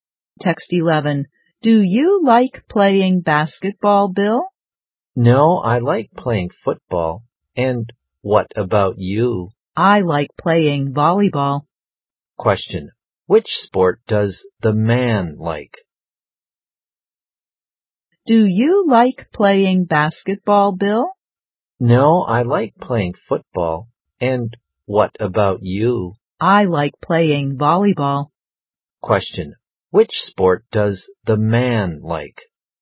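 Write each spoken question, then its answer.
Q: Which sport does the man like?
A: Football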